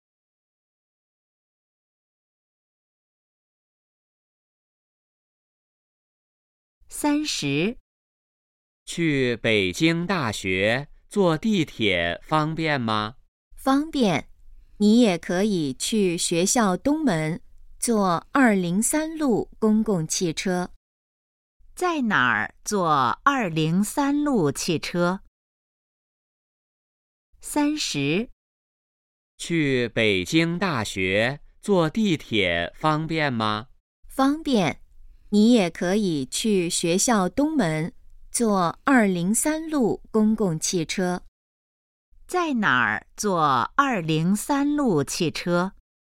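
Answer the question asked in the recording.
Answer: 学校东门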